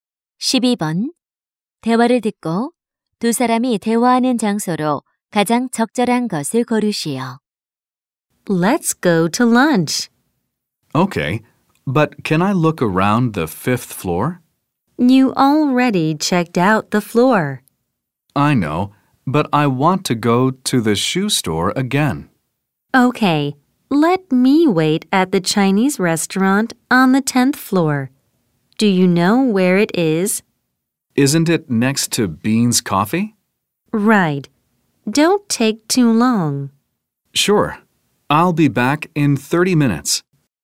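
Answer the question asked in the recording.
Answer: 백화점(쇼핑몰)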